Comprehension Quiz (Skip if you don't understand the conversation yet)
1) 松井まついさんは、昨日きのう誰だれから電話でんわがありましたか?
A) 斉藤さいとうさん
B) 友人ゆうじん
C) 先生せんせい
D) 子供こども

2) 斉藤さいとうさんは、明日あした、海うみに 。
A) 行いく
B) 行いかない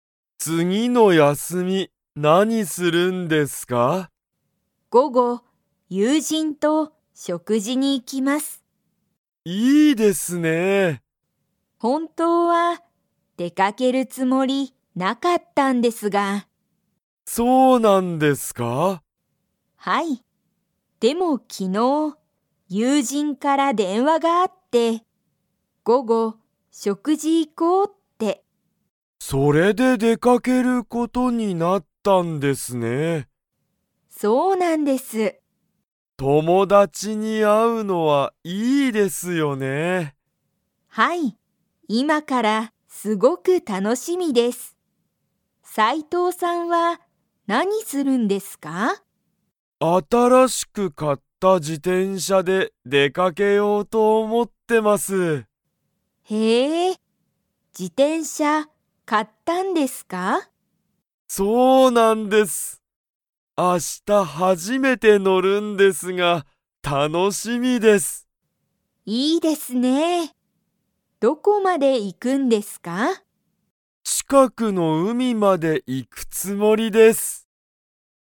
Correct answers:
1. 友人ゆうじん
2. 行いく

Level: Level 3

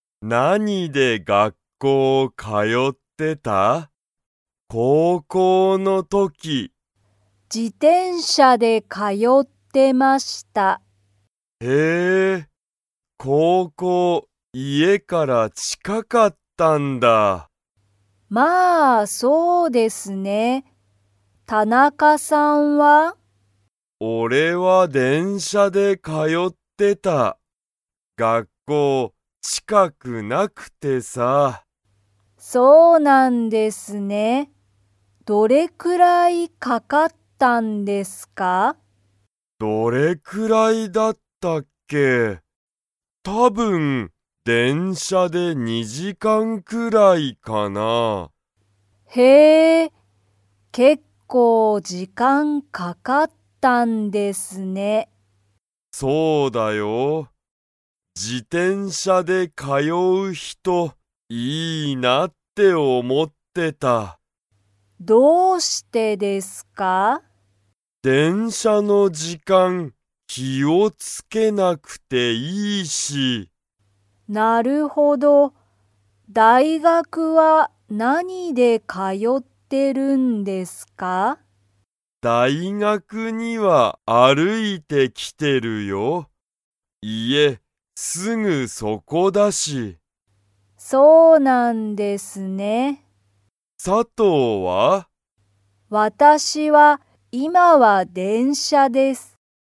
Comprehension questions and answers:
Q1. 田中たなかの高校こうこうは、家いえから近ちかかったですか?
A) はい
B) いいえ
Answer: いいえ

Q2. 佐藤さとうは今いま、 大学だいがくに通かよっている。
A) 電車でんしゃで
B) バスで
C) 歩あるいて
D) 自転車じてんしゃで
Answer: 電車でんしゃで

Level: Level 3

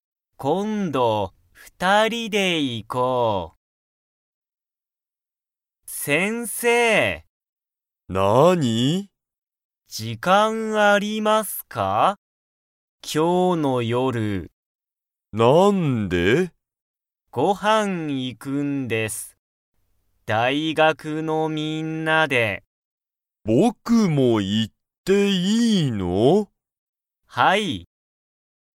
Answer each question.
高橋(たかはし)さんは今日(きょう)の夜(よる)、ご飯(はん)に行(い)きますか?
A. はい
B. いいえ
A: はい

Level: Level 1

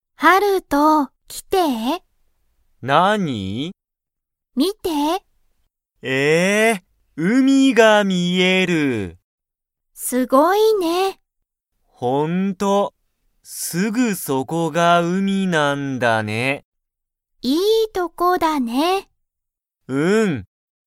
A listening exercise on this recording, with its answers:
____が海(うみ)だ。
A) いいとこ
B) すぐそこ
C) ほんと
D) あとで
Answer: すぐそこ

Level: Level 1

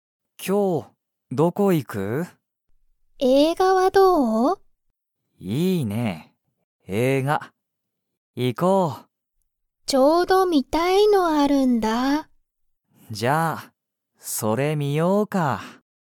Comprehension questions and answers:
ユリは、____映画えいががある。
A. この前観まえみた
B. すごく好すきな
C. 全然ぜんぜんよくない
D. ちょうど観みたい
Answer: ちょうど観みたい

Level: Level 1

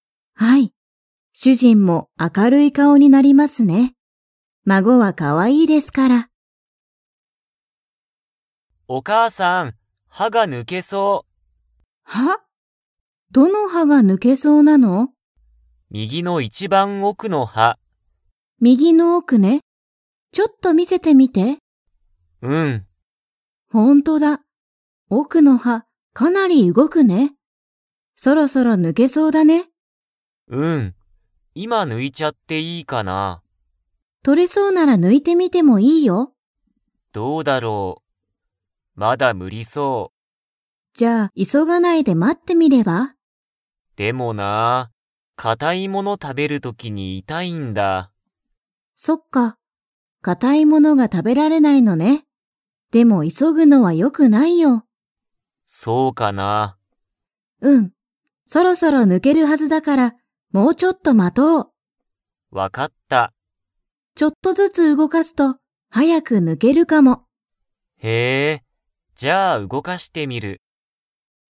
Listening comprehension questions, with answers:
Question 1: どの歯はが抜ぬけそうですか?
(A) 右みぎの前まえ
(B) 右みぎの奥おく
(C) 左ひだりの前まえ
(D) 左ひだりの奥おく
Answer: 右みぎの奥おく

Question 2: ハヤトは、固かたいものが 。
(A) 食たべられる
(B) 食たべられない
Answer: 食たべられない

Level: Level 4

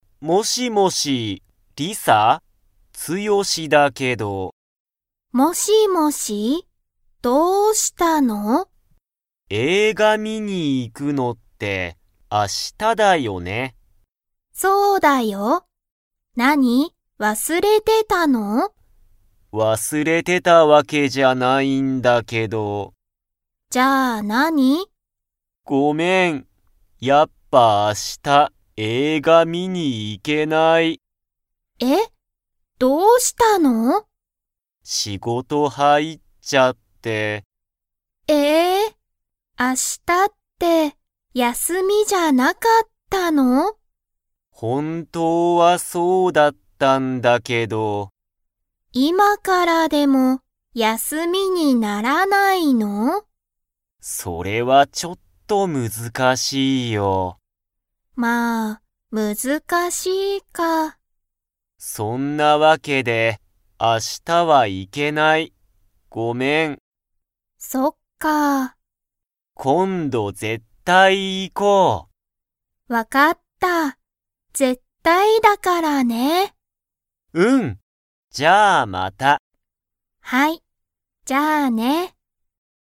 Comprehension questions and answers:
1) リサとツヨシは明日(あした)、映画(えいが)を観(み)に行(い)きますか?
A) はい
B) いいえ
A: いいえ

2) ツヨシは明日(あした)、本当(ほんとう)は____だった。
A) 学校(がっこう)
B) 休(やす)み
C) 普通(ふつう)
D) 影響(えいきょう)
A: 休(やす)み

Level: Level 2

